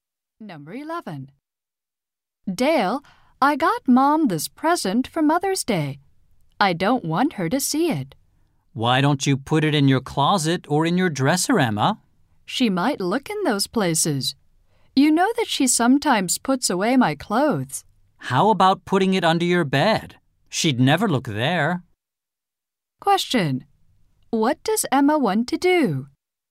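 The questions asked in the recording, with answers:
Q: What does Emma want to do?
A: Hide the Mother's Day present from her mother.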